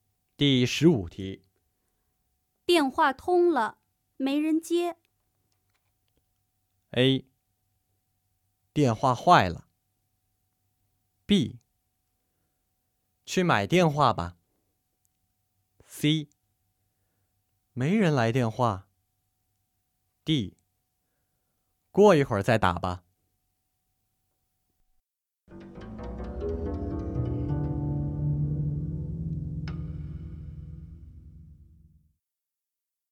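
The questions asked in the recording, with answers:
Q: 电话通了,没人接。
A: D: 过一会儿再打吧。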